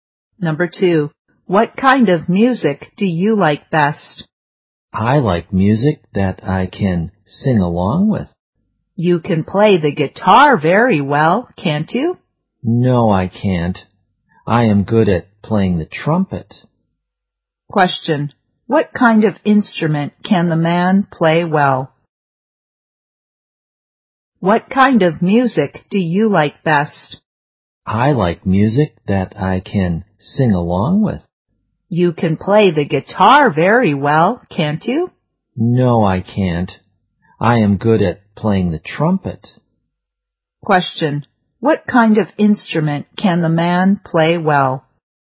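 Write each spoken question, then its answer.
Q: What kind of instrument can the man play well?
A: The trumpet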